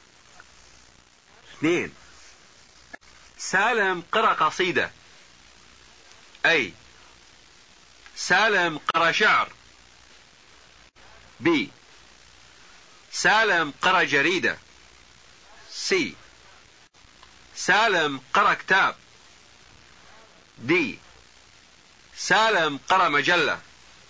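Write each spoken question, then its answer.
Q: 2. سالم قرأ قصيدة.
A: A: سالم قرأ شعر.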